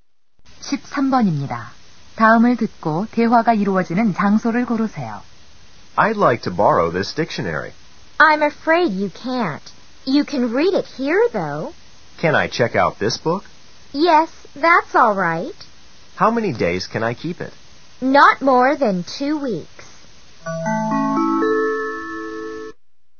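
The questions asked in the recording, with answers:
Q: 다음을 듣고 대화가 이루어지는 장소를 고르세요.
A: 도서관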